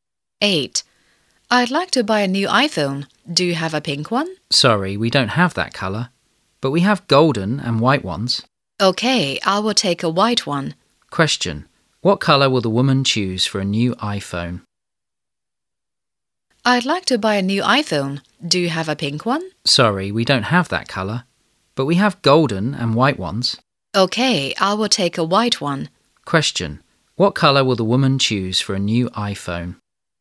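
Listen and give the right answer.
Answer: White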